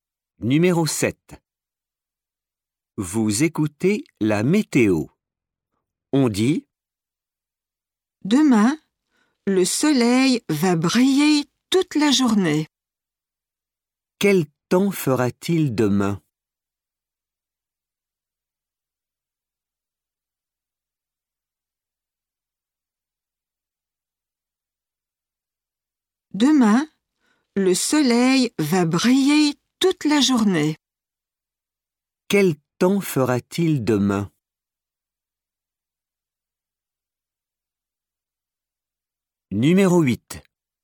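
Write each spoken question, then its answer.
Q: Quel temps fera-t-il demain?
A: du soleil toute la journée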